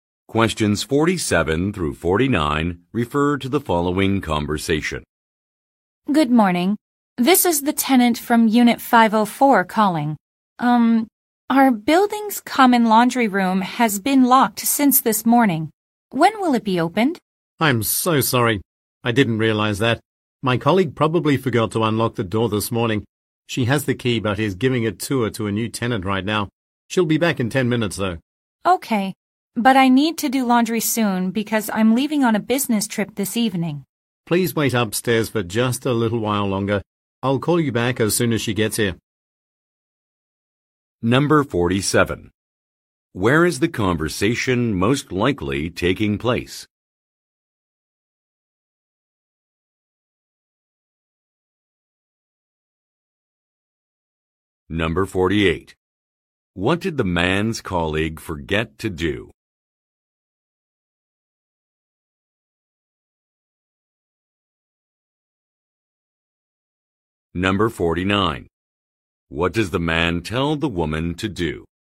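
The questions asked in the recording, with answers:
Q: What did the man's colleague forget to do?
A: Unlock the laundry room door

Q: What does the man tell the woman to do?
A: Wait upstairs until he calls her back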